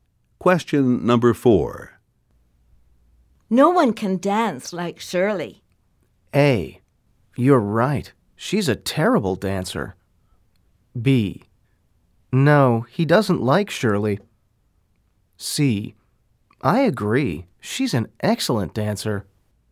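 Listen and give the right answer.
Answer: C: I agree. She's an excellent dancer.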